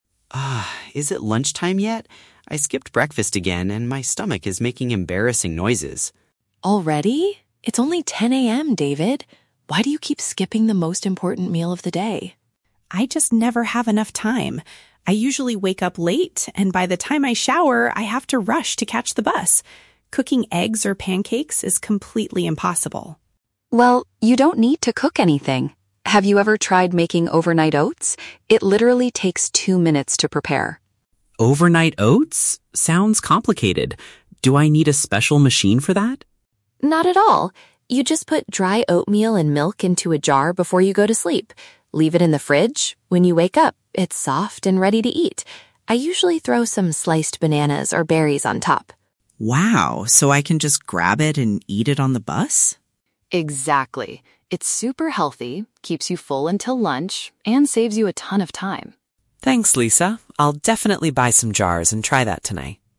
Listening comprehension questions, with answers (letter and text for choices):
Listen to a conversation between two colleagues. For each question, choose the correct answer (A, B, or C).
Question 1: Why is David feeling hungry so early in the morning?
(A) He didn't eat anything before leaving his house.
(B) He had a very small lunch at the office cafeteria.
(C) He went for a long run before catching his daily bus.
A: (A) He didn't eat anything before leaving his house.

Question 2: What is the main advantage of Lisa's breakfast suggestion?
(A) It requires using a highly advanced kitchen appliance.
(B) It can be prepared the night before to avoid rushing.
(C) It is the only meal that includes fresh cooked eggs.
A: (B) It can be prepared the night before to avoid rushing.

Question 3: What does David plan to do as a result of the conversation?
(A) Eat his morning meal at his office desk tomorrow.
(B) Ask Lisa to share her favorite fresh fruit with him.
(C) Purchase some containers to start making the dish.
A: (C) Purchase some containers to start making the dish.

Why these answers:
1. David says he "skipped breakfast again," which means he didn't eat anything before leaving his house. Option (B) is a trap; the word "lunchtime" is mentioned, but only because David is waiting for it (it is only 10 AM). Option (C) is a trap; he mentions he has to "catch the bus", but he didn't go for a run (he woke up late).
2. Lisa explains that you put the ingredients in a jar "before you go to sleep" and leave it in the fridge, saving a ton of time in the morning. Option (A) is a trap; David asks if he needs a "special machine," but Lisa explicitly says, "Not at all." Option (C) is a trap; David mentions "eggs" and "pancakes" as things he cannot cook because he lacks time.
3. At the end, David says, "I'll definitely buy some jars and try that tonight," which means purchasing containers to make the dish. Option (A) is not mentioned; he talks about eating it "on the bus." Option (B) is a trap; Lisa mentions adding "bananas or berries" (fresh fruit), but David does not ask her to share them.

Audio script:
David: Ugh, is it lunchtime yet? I skipped breakfast again and my stomach is making embarrassing noises.
Lisa: Already? It's only 10 AM, David. Why do you keep skipping the most important meal of the day?
David: I just never have enough time. I usually wake up late, and by the time I shower, I have to rush to catch the bus. Cooking eggs or pancakes is completely impossible.
Lisa: Well, you don't need to cook anything. Have you ever tried making overnight oats? It literally takes two minutes to prepare.
David: Overnight oats? Sounds complicated. Do I need a special machine for that?
Lisa: Not at all. You just put dry oatmeal and milk into a jar before you go to sleep. Leave it in the fridge. When you wake up, it's soft and ready to eat. I usually throw some sliced bananas or berries on top.
David: Wow, so I can just grab it and eat it on the bus?
Lisa: Exactly. It's super healthy, keeps you full until lunch, and saves you a ton of time.